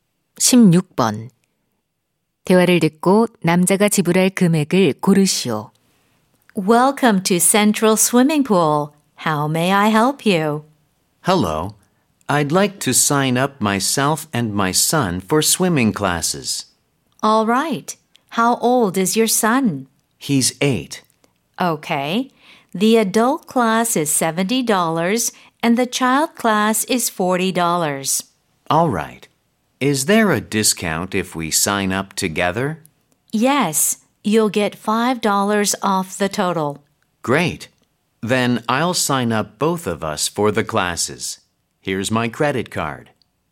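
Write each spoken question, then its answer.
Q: 대화를 듣고 남자가 지불할 금액을 고르시오.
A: 105달러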